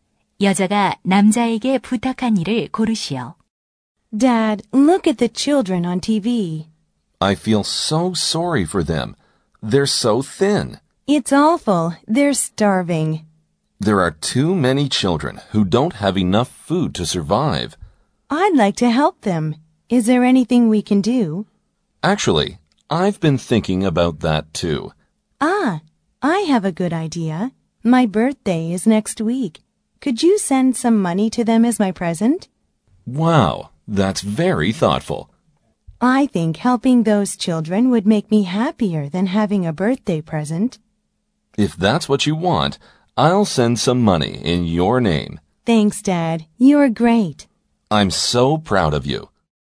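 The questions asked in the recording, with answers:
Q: 대화를 듣고 여자가 남자에게 부탁한 일을 고르시오.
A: 생일 선물 대신 굶주린 아이들에게 돈 보내기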